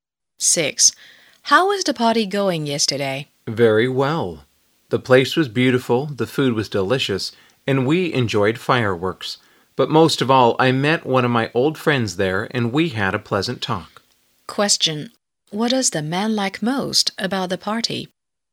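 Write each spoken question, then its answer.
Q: What does the man like most about the party?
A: Meeting an old friend and having a pleasant talk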